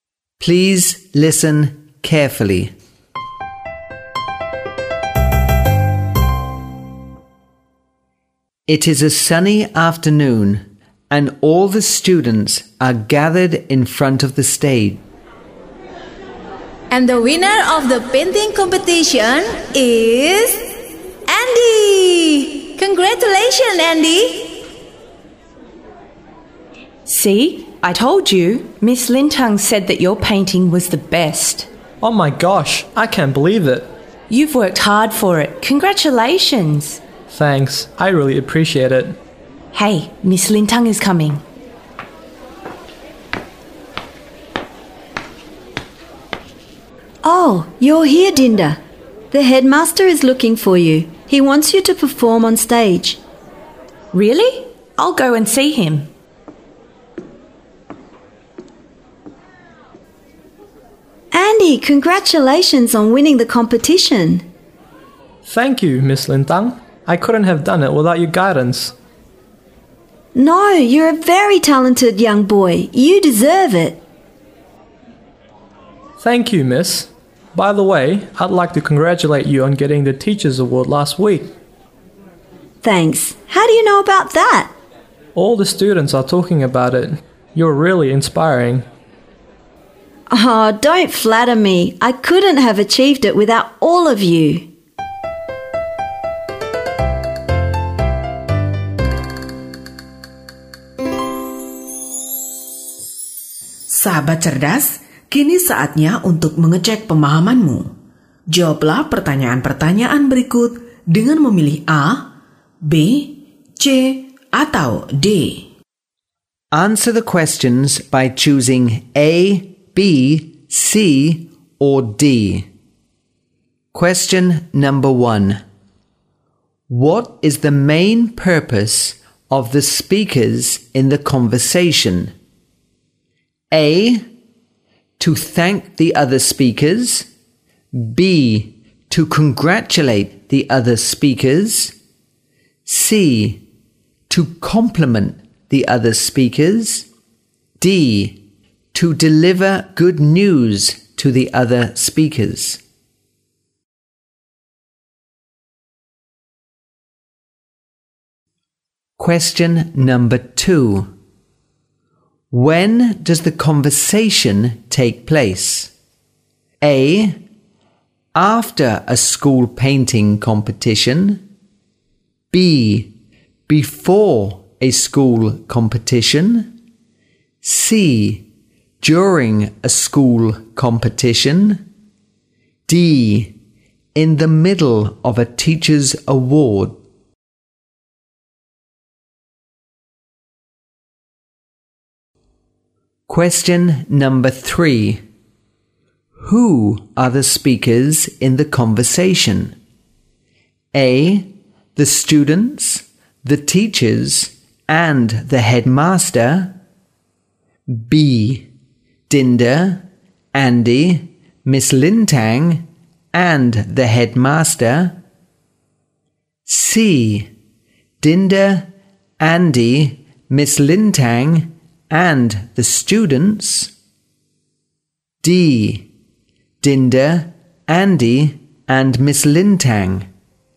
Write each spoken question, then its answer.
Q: What is the main purpose of the speakers in the conversation?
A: B. To congratulate the other speakers.

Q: When does the conversation take place?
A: A. After a school painting competition.